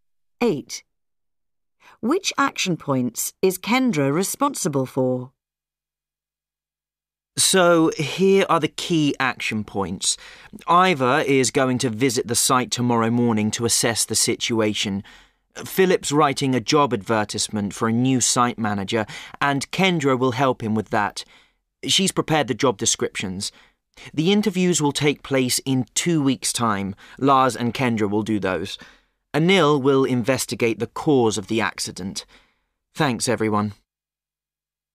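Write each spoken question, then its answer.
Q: Which action points is Kendra responsible for?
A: Helping write the job advertisement and doing the interviews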